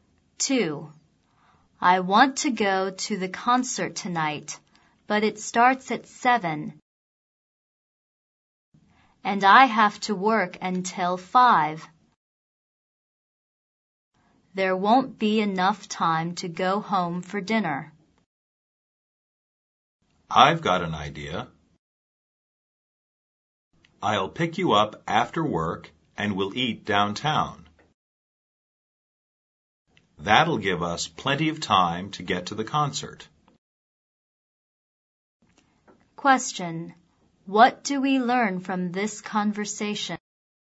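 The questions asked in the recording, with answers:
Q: What do we learn from this conversation?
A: They will eat dinner downtown before the concert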